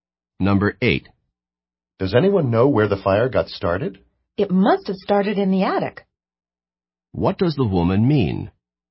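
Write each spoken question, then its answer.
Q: What does the woman mean?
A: The fire probably started in the attic.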